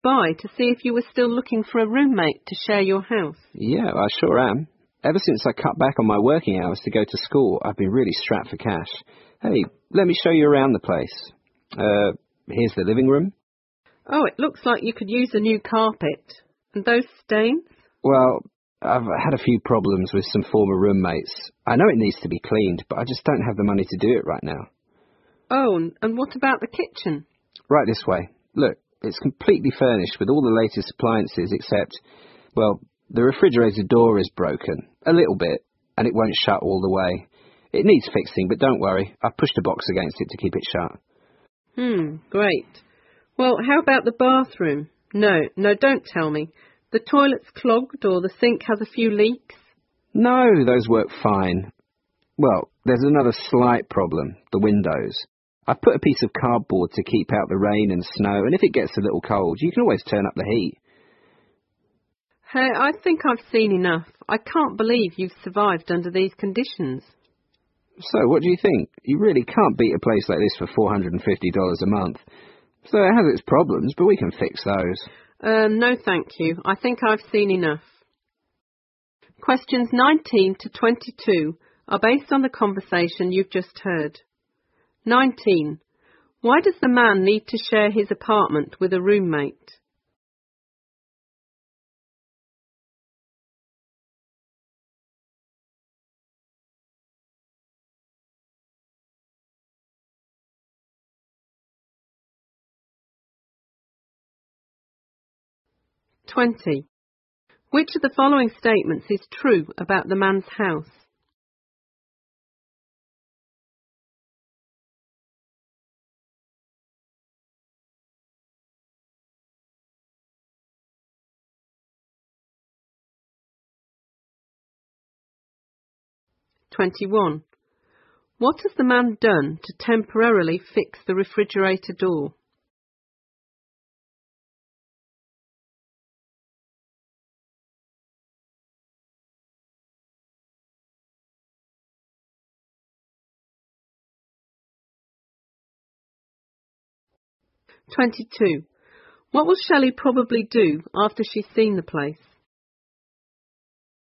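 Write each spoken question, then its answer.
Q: Why does the man need to share his apartment with a roommate?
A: He cut back his working hours to go to school and is short of money.

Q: What has the man done to temporarily fix the refrigerator door?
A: He pushed a box against it to keep it shut.

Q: What will Shelley probably do after she's seen the place?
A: Turn it down and keep looking for another place.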